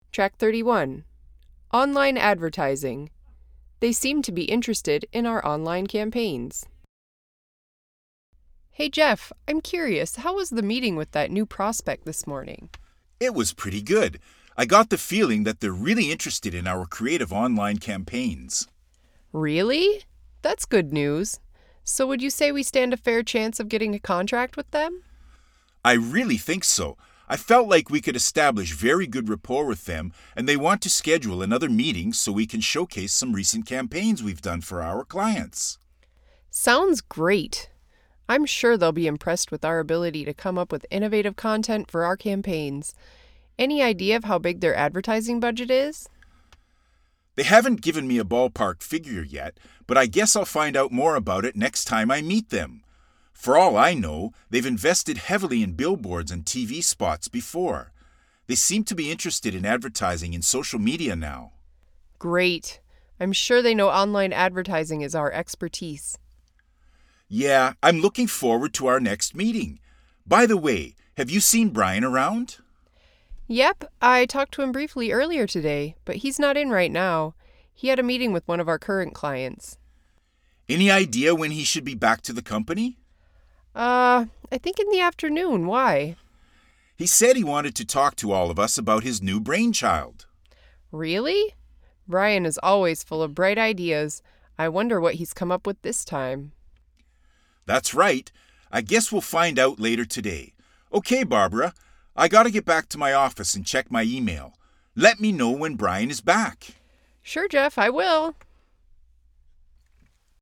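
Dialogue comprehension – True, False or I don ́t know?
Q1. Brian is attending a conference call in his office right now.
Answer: False

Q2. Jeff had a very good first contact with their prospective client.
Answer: True

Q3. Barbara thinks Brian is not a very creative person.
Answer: False

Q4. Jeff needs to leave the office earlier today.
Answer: I don ́t know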